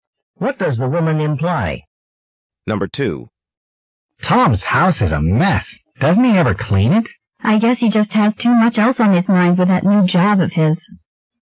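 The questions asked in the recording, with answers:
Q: What does the woman imply about Tom?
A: He is too busy with his new job to clean.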